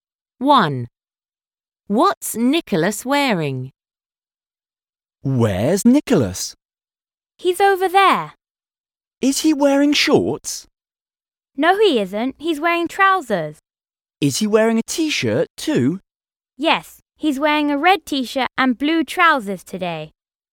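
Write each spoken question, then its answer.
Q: What's Nicholas wearing?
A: A red t-shirt and blue trousers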